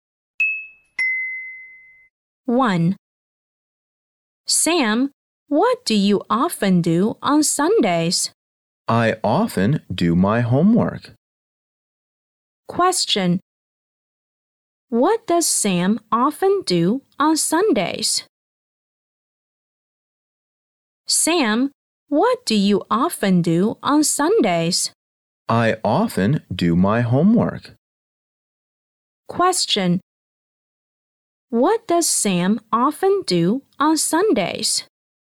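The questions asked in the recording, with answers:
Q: What does Sam often do on Sundays?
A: He often does his homework.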